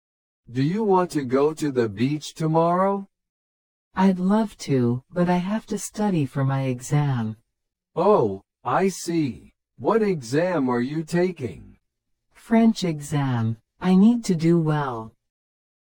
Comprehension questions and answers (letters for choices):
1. What does he want to do tomorrow?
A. Go to the beach.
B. Study for an exam.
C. Hold a party.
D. Go to a museum.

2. Why can't she go to the beach?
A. She is busy with work.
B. She has to study for an exam.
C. She will visit family.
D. She is feeling sick.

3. What exam is she taking?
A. Japanese.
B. English.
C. History.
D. French.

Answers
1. A
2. B
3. D

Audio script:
Do you want to go to the beach tomorrow?
I'd love to, but I have to study for my exam.

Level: 初級者用